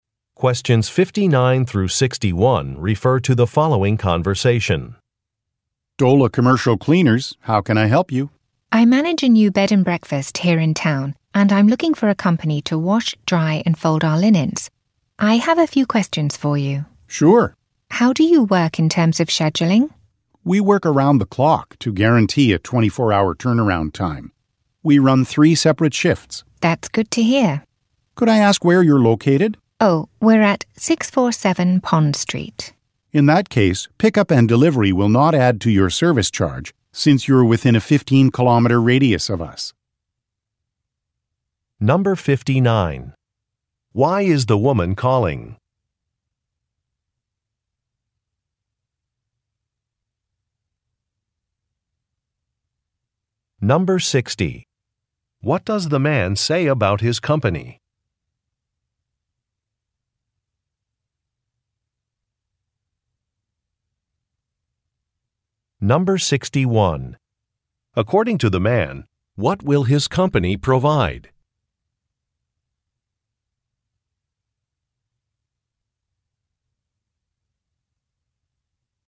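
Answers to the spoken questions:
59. To find a company to wash, dry, and fold her bed and breakfast's linens
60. It guarantees a 24-hour turnaround by working around the clock in three shifts
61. Free pickup and delivery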